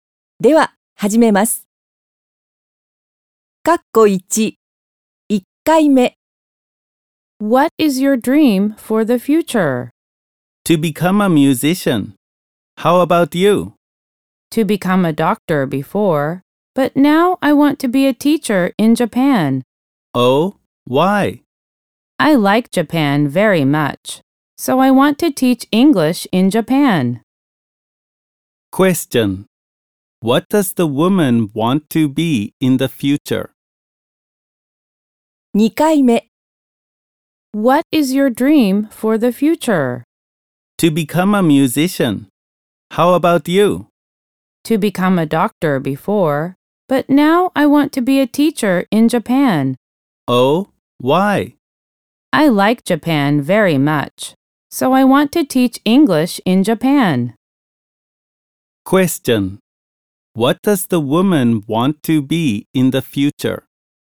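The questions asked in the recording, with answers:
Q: What does the woman want to be in the future?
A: A teacher in Japan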